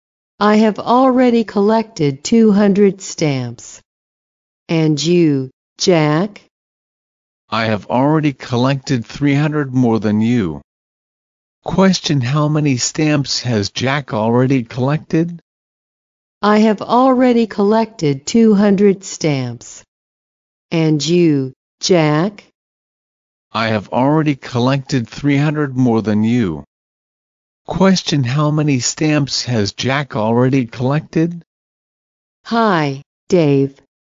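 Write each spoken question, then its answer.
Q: Question, how many stamps has Jack already collected?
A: 500 stamps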